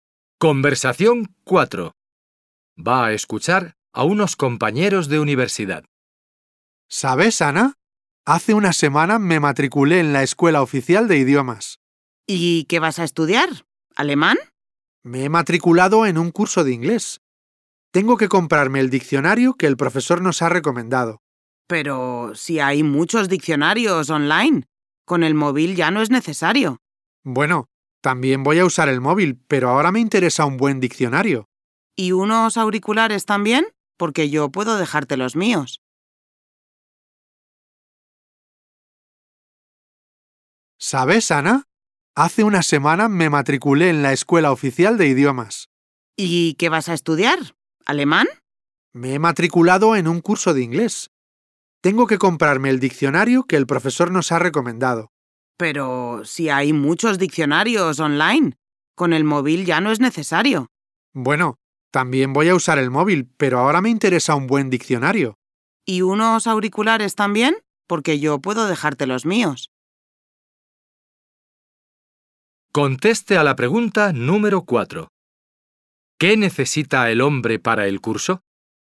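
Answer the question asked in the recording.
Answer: Un diccionario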